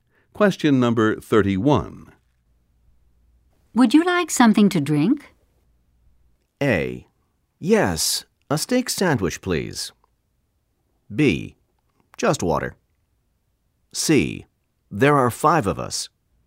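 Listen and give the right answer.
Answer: B: Just water.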